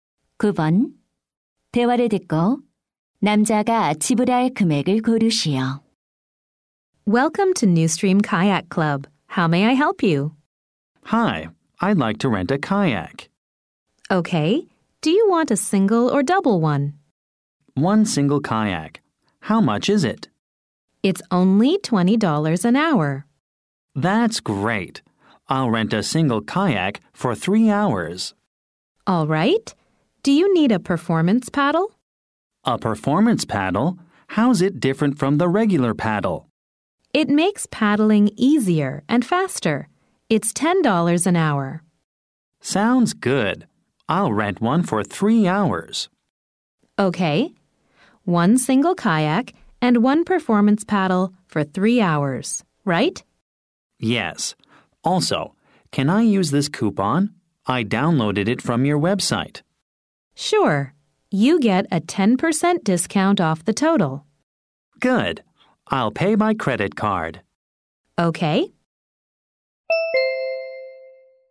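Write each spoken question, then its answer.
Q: 대화를 듣고 남자가 지불할 금액을 고르시오.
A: $81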